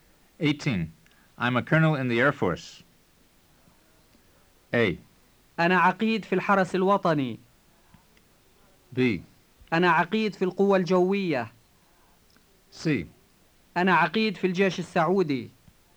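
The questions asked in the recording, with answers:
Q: I'm a colonel in the Air Force.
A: B: أنا عقيد في القوة الجوية.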